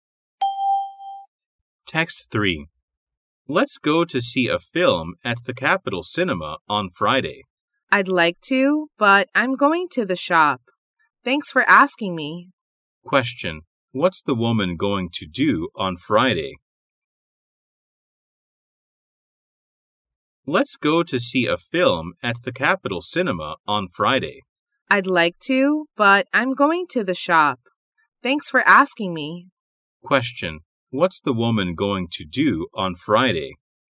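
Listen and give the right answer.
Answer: Go to the shop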